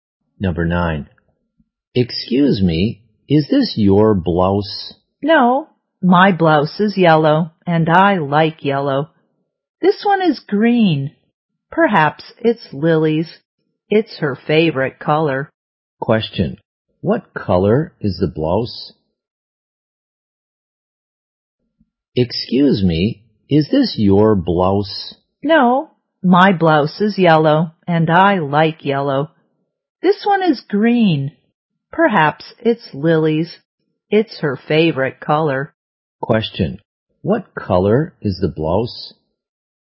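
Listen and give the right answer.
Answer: Green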